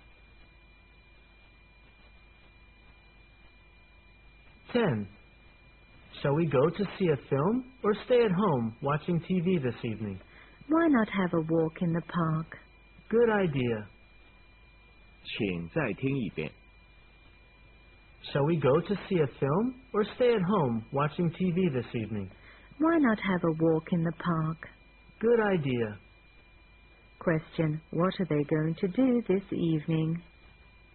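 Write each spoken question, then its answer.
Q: What are they going to do this evening?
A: Have a walk in the park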